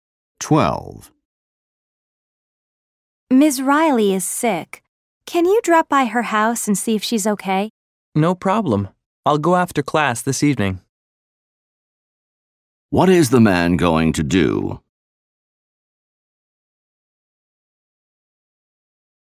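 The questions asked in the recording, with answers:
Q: What is the man going to do?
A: Visit Ms. Riley after class this evening.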